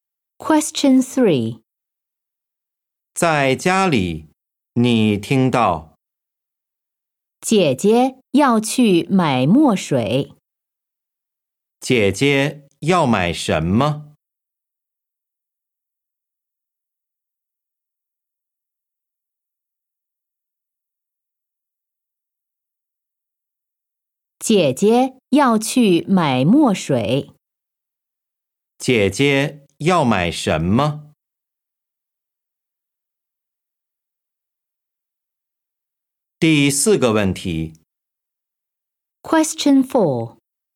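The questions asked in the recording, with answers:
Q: 姐姐要买什么?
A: 墨水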